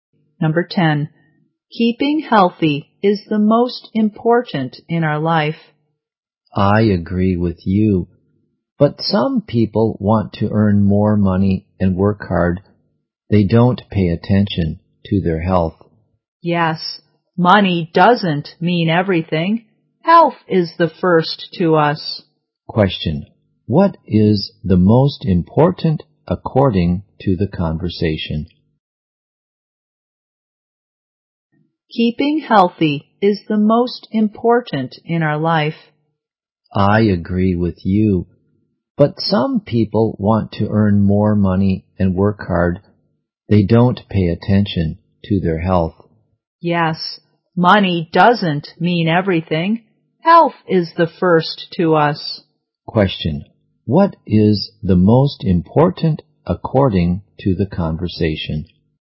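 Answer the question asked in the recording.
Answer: Health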